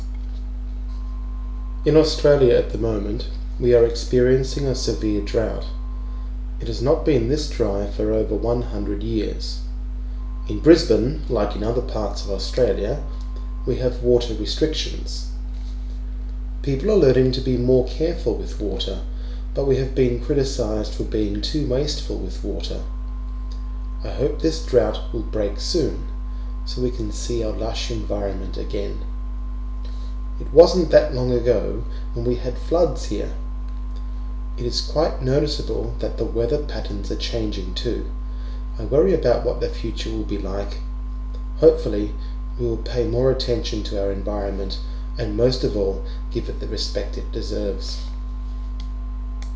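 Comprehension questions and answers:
Listen to the text one more time and decide whether the following sentences are true or false.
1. Australia was drier than this 50 years ago.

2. Brisbane is not the only city to have limitations with water.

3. People think Australians waste too much water.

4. Australia has never been very green.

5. It seems like it was a long time ago when we had rain.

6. The speaker is concerned about the future because the weather never changes.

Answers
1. False
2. True
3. True
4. False
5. False
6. False

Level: Level 11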